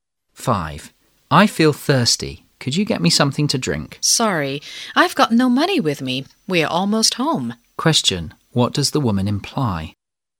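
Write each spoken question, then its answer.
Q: What does the woman imply?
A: The man can get a drink when they get home soon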